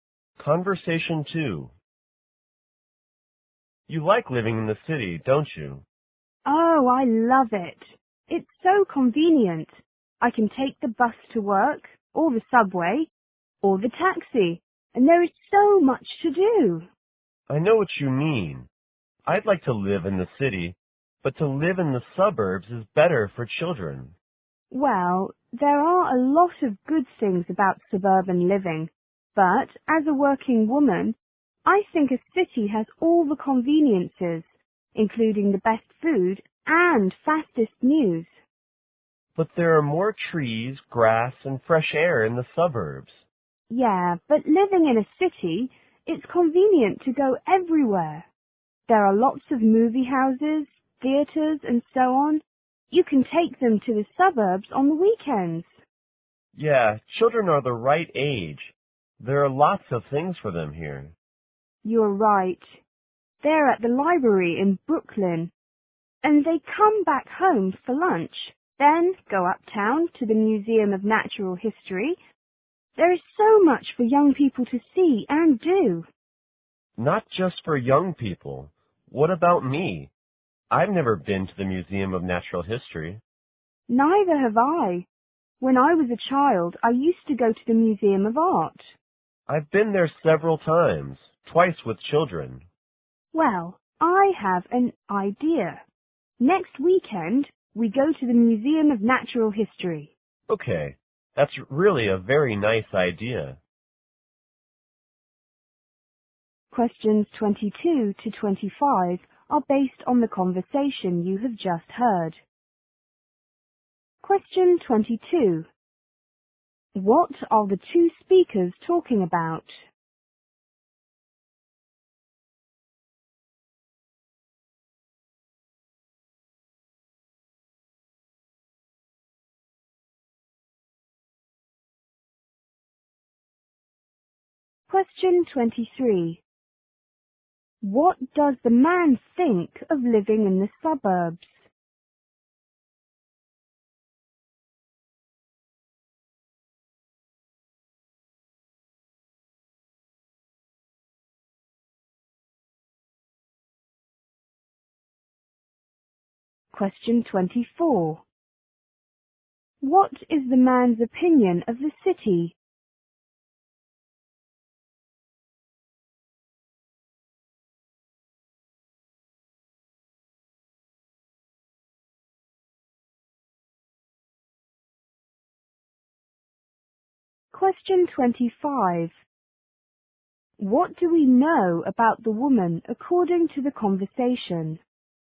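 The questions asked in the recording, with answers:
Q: What are the two speakers talking about?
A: Living in the city versus living in the suburbs

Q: What does the man think of living in the suburbs?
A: It's better for children.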